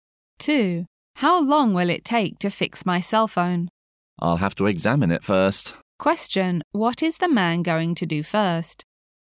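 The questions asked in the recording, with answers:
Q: What is the man going to do first?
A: Examine the cell phone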